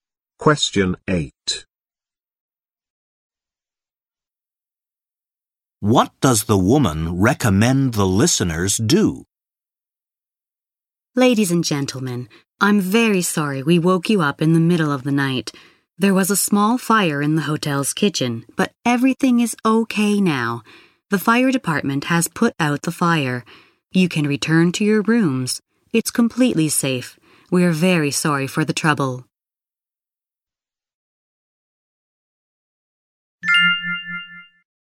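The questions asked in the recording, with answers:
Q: What does the woman recommend the listeners do?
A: Return to their rooms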